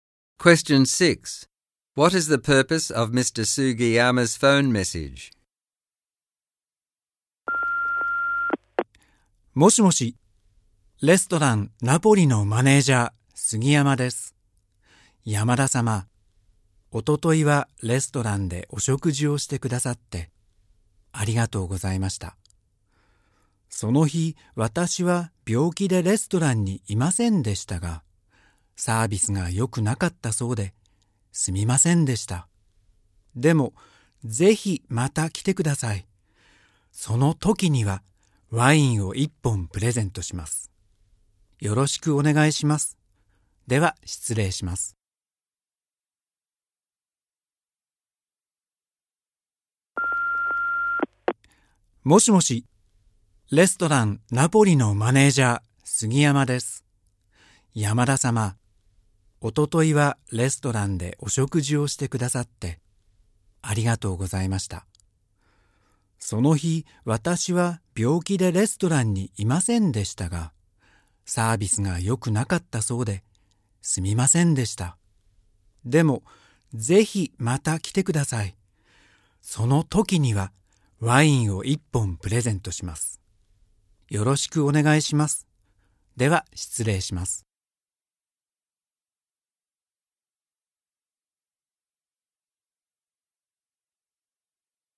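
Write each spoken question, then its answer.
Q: What is the purpose of Mr. Sugiyama's phone message?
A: To apologise for the poor service at the restaurant and invite Mr. Yamada back with an offer of a free bottle of wine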